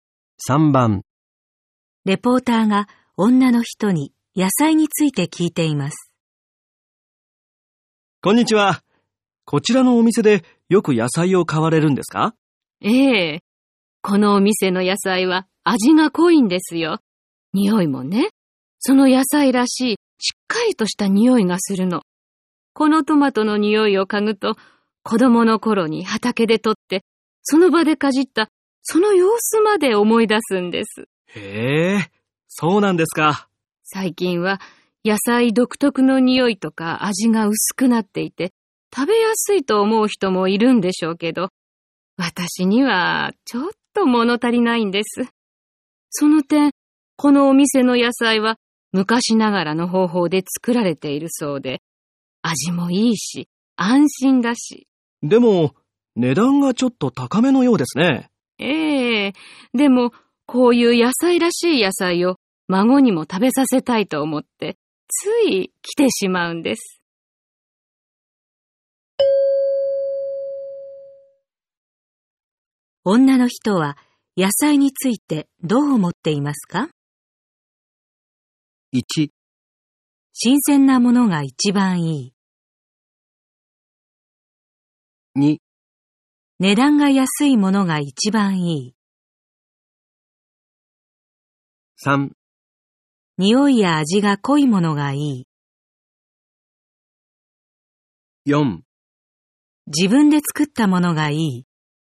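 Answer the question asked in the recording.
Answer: 3: 匂いや味が濃いものがいい。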